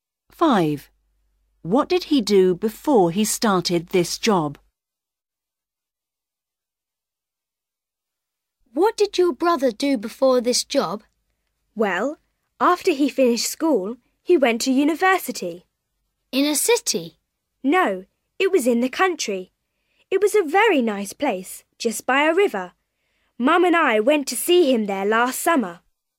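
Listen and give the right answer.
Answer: He went to university in the country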